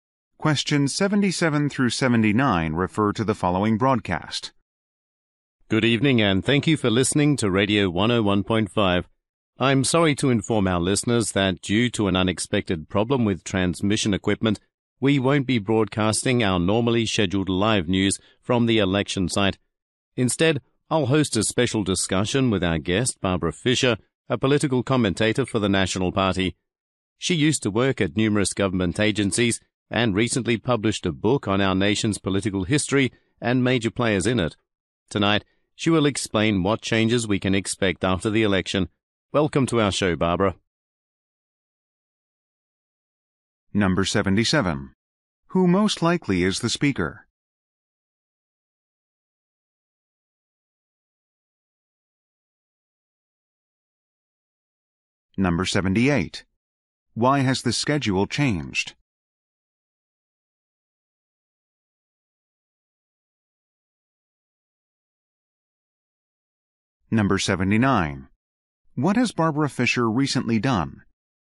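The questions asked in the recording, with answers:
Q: Who most likely is the speaker?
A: A radio host

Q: Why has the schedule changed?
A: A problem with transmission equipment

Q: What has Barbara Fisher recently done?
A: Published a book on the nation's political history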